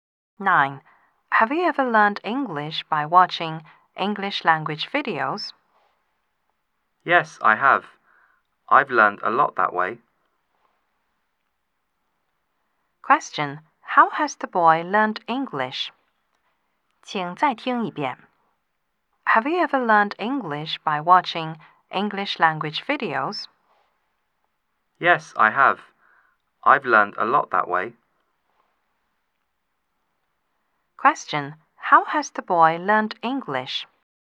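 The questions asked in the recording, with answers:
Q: Question.How has the boy learned English?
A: By watching English language videos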